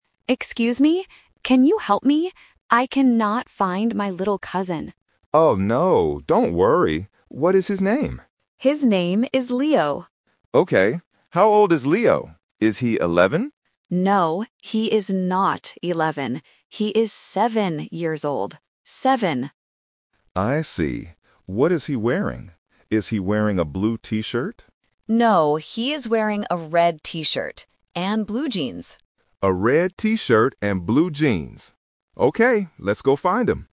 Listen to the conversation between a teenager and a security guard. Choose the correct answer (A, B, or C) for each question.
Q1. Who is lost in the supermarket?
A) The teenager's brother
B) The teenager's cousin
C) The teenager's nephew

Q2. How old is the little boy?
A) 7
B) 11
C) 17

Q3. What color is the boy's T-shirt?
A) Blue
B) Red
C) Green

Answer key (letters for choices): 1B, 2A, 3B

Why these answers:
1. The teenager clearly says, "I cannot find my little cousin." Option A (brother) and Option C (nephew) are other male family members used as traps to test if the listener caught the exact vocabulary word.
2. The guard asks, "Is he eleven?" (Option B is the trap). The teenager says, "No, he is not eleven. He is seven years old." Option C (17) is a phonetic trap because "seven" and "seventeen" can sound similar to A1 beginners.
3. The guard asks, "Is he wearing a blue T-shirt?" (Option A is the trap). The teenager answers, "No, he is wearing a red T-shirt," and spells the word R-E-D. The boy is wearing blue jeans, not a blue T-shirt. Option C (Green) is a plausible color but is never mentioned.